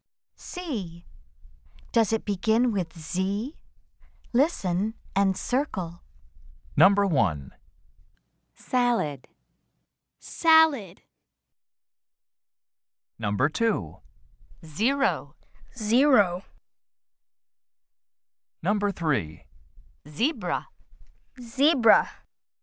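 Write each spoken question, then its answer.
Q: Does it begin with Z?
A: No (salad)

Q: Does it begin with Z?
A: Yes (zero)

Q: Does it begin with Z?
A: Yes (zebra)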